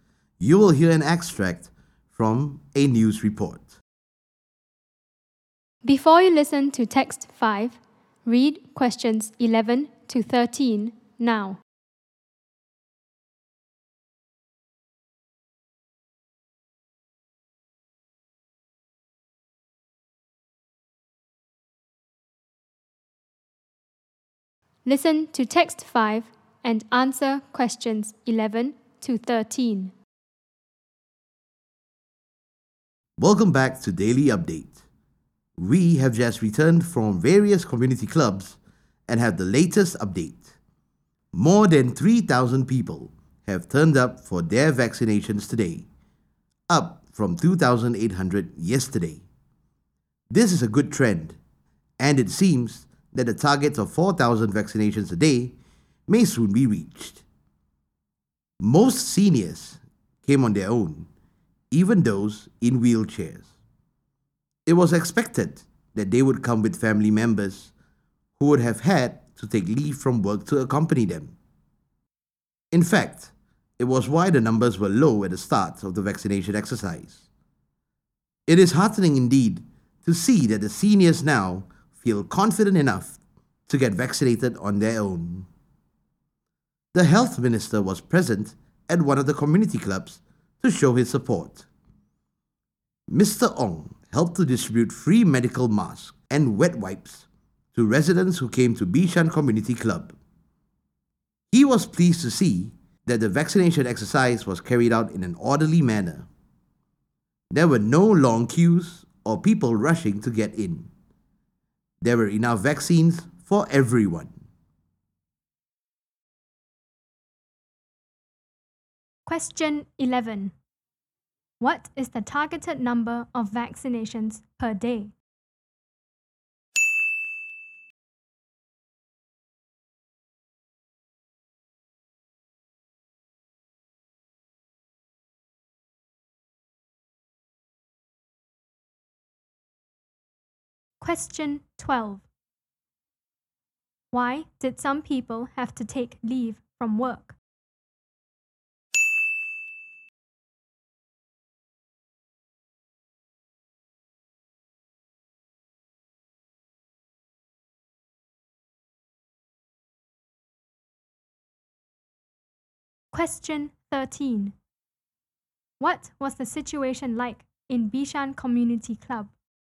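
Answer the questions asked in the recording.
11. 4,000
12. To accompany seniors (family members) to get vaccinated
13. Orderly, with no long queues and enough vaccines for everyone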